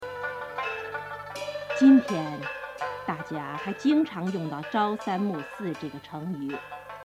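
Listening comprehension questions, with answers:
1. 1〇〇2〇〇还3〇〇用到朝三暮四这个成语,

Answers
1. 1今天 jīntiān 2大家 dàjiā 3经常 jīngcháng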